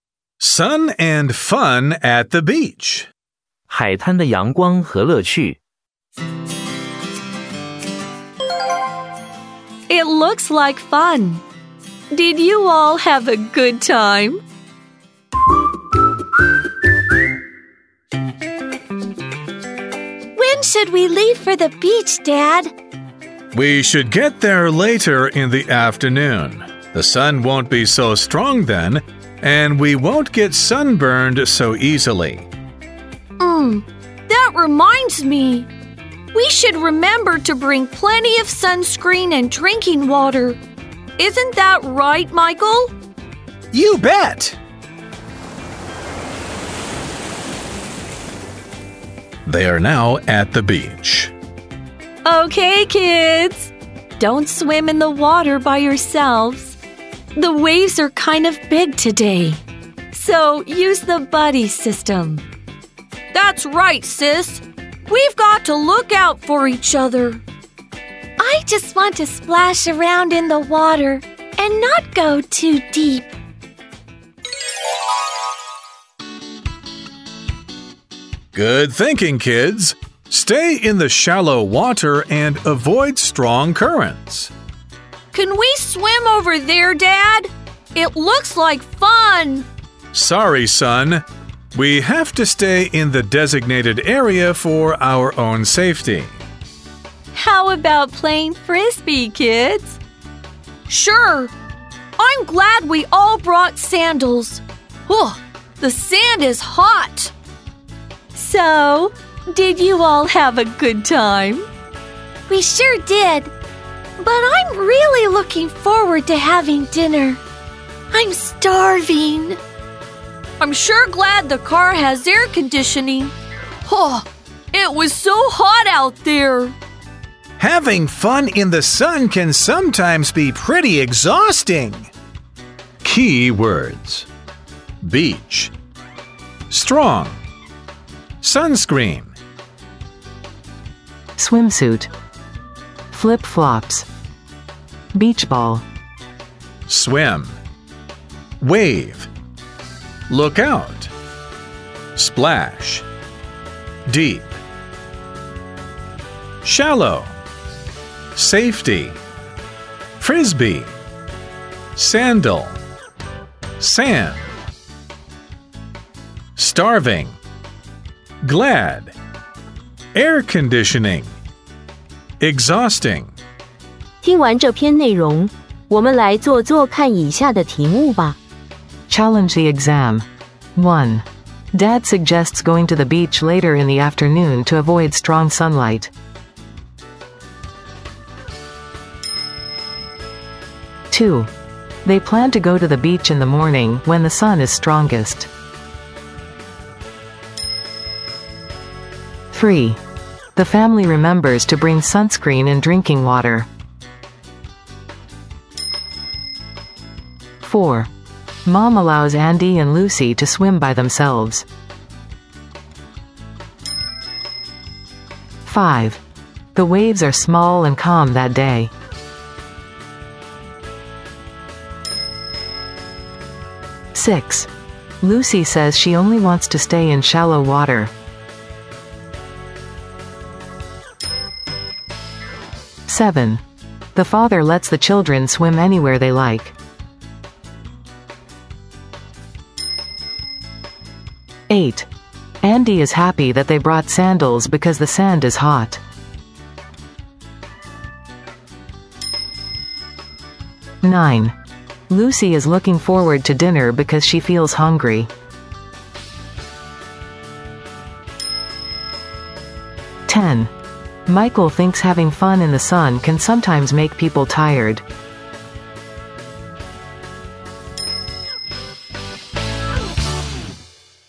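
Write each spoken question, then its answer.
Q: Dad suggests going to the beach later in the afternoon to avoid strong sunlight.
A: True

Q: They plan to go to the beach in the morning when the sun is strongest.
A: False

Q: The family remembers to bring sunscreen and drinking water.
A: True

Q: Mom allows Andy and Lucy to swim by themselves.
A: False

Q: The waves are small and calm that day.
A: False

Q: The father lets the children swim anywhere they like.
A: False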